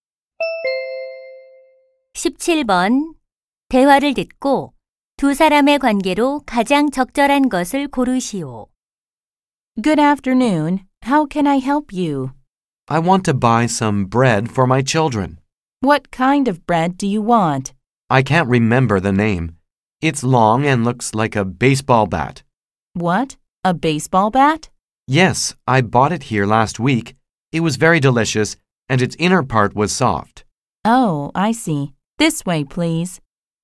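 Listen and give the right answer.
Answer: 제과점 점원과 손님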